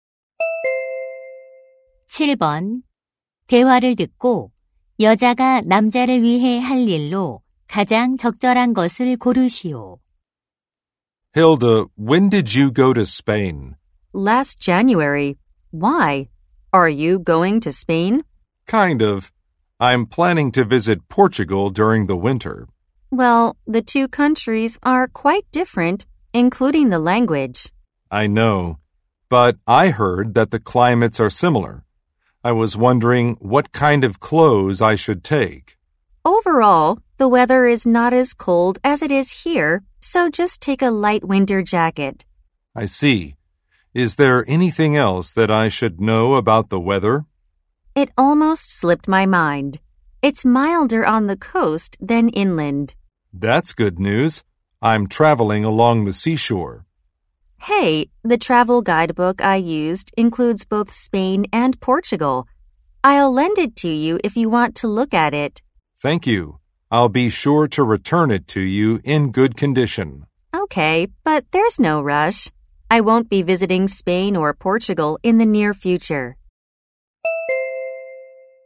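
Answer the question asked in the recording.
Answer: 여행 안내서 빌려주기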